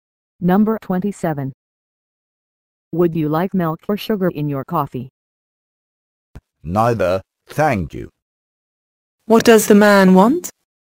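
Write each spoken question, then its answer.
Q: What does the man want?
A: Coffee with no milk or sugar.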